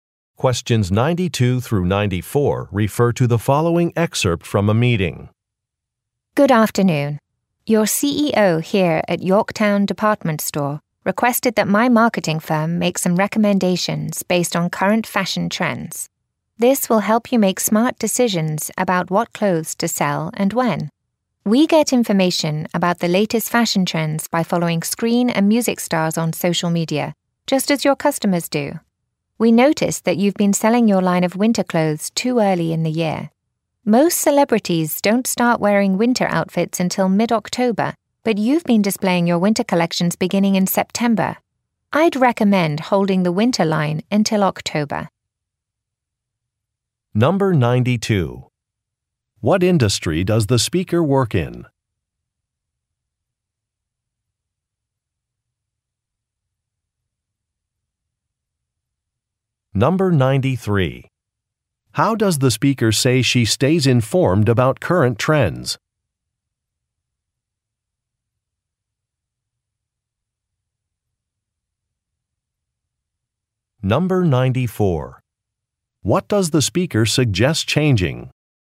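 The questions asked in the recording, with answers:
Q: What industry does the speaker work in?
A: Marketing

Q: How does the speaker say she stays informed about current trends?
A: By following screen and music stars on social media

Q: What does the speaker suggest changing?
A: When the winter clothing line is displayed (hold it until October)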